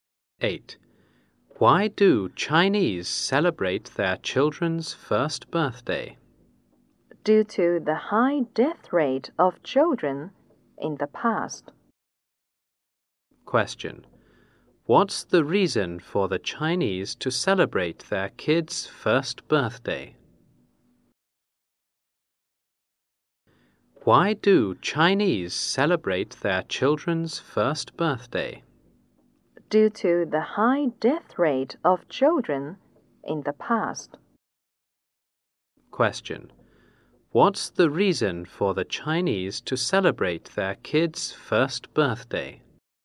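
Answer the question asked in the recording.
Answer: The high death rate of children in the past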